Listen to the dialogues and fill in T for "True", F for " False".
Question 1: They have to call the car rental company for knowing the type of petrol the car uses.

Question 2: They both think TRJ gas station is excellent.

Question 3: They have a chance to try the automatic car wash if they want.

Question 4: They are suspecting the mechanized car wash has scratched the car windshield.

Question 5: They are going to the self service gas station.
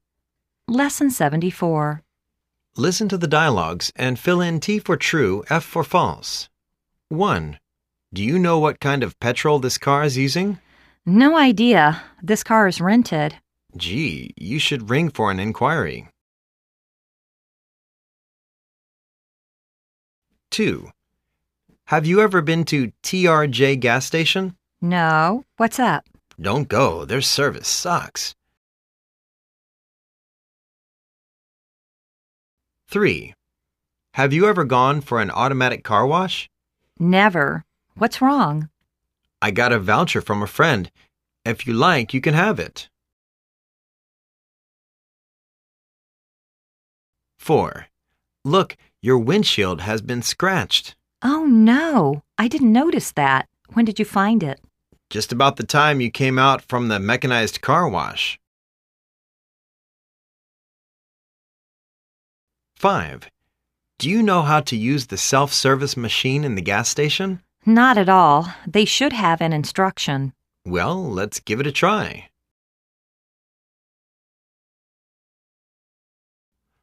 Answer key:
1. T
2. F
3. T
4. T
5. T